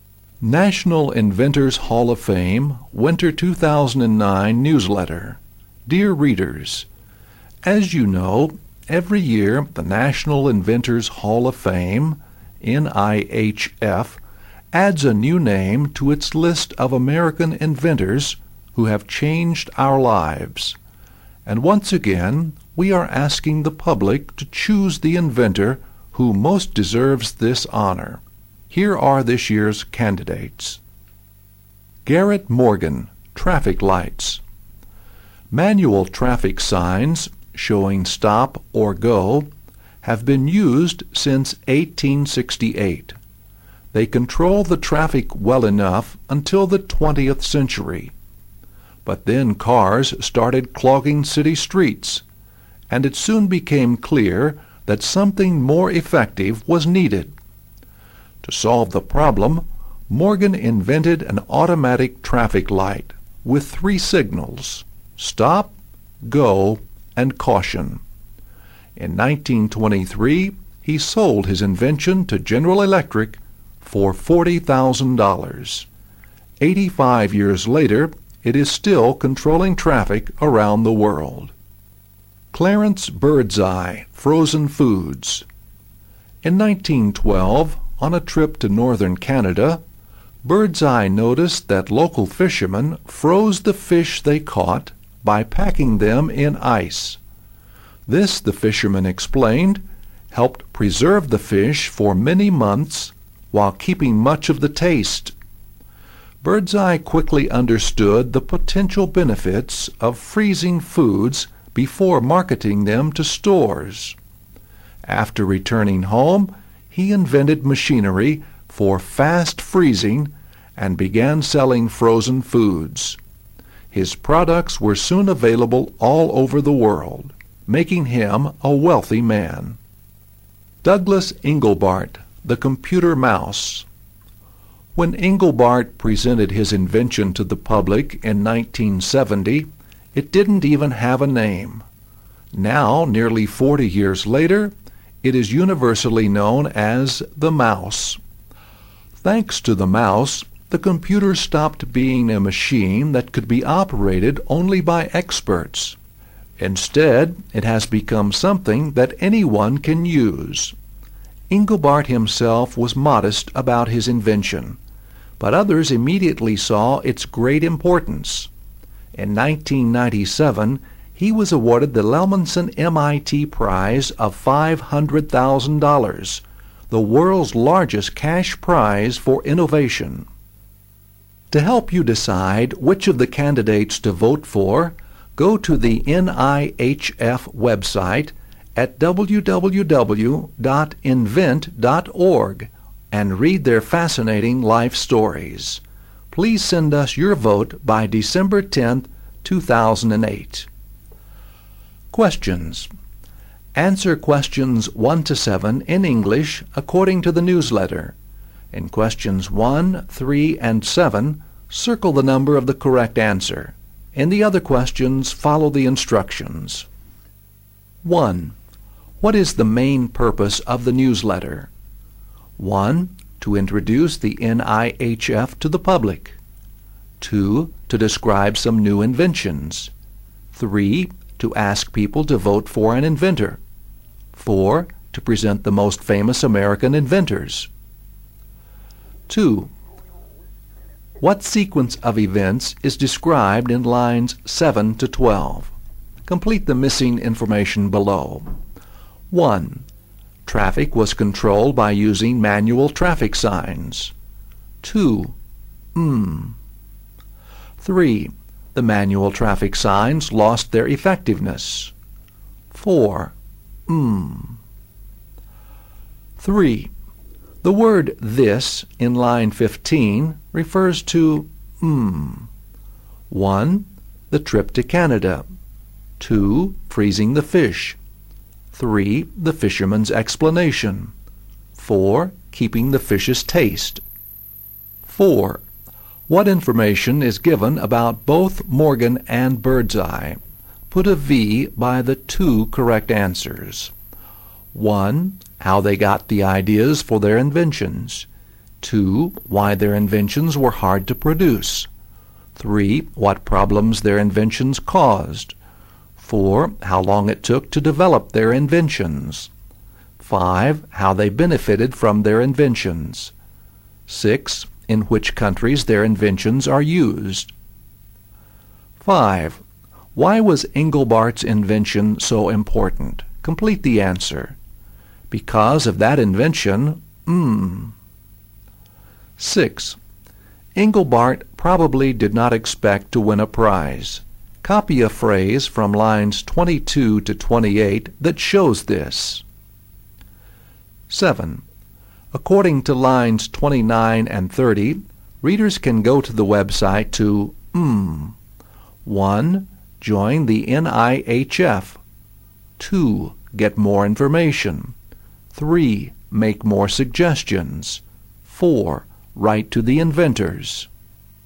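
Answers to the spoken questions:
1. 3: To ask people to vote for an inventor.
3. 2: Freezing the fish.
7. 2: Get more information.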